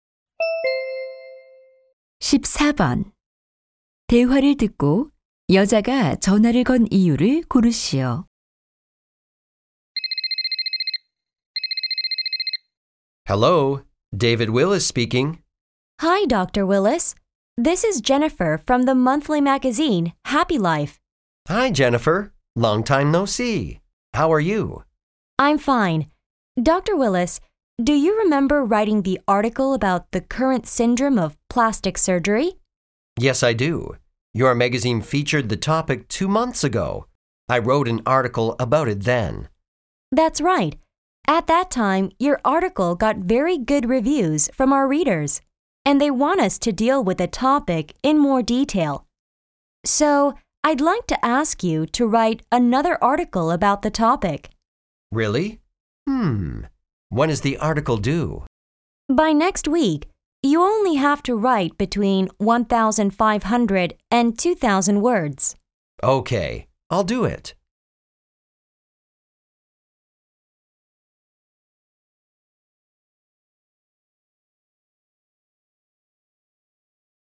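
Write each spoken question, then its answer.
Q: 대화를 듣고 여자가 전화를 건 이유를 고르시오.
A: 성형수술에 관한 기사를 다시 써 달라고 부탁하려고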